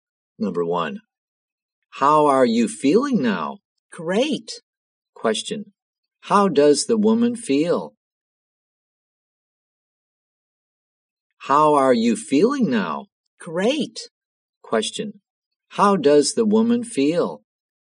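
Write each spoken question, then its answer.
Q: how does the woman feel?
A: Great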